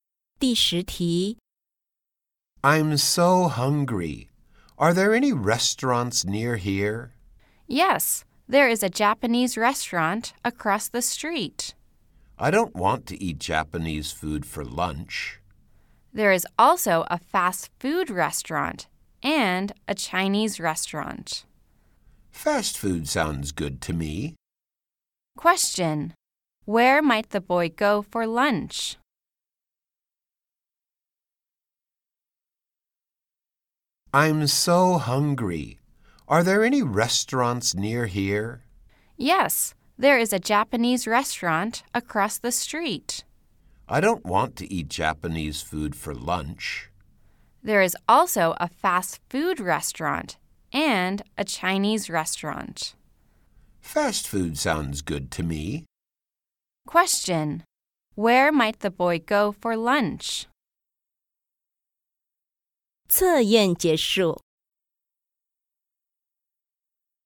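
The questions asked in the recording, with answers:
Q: Where might the boy go for lunch?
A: A fast food restaurant.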